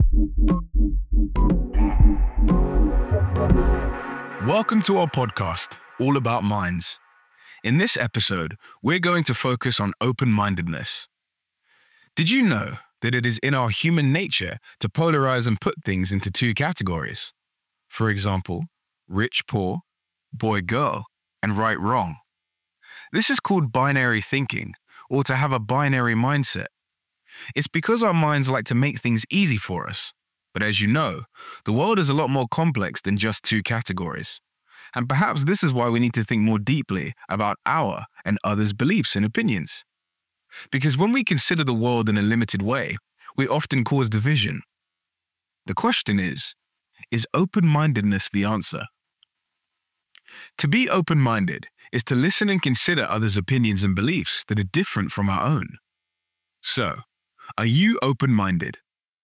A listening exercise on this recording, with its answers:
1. What is it called when we put things into two categories?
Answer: binary thinking/mindset

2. What happens when we view the world in a limited way?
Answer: It causes division.

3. What could be the answer?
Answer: open-mindedness